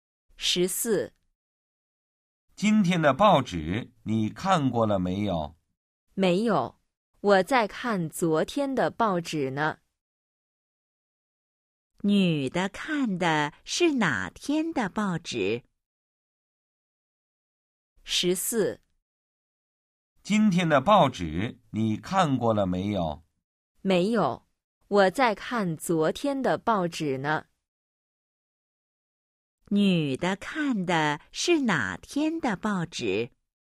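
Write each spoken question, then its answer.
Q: 女的看的是哪天的报纸?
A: 昨天的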